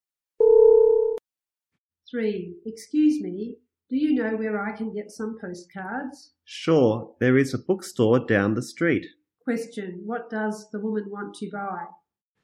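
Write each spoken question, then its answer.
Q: Question, what does the woman want to buy?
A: Postcards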